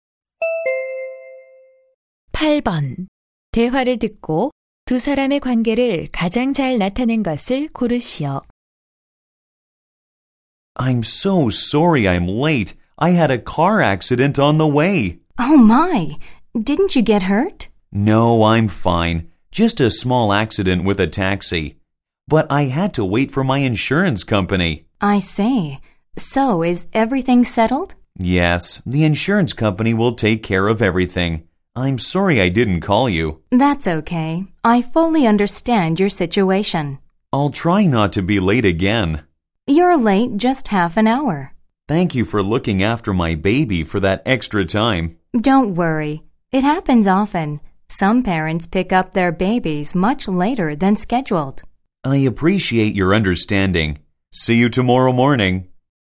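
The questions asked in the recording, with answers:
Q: 대화를 듣고 두 사람의 관계를 가장 잘 나타낸 것을 고르시오.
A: 아기 엄마(학부모) - 보육 교사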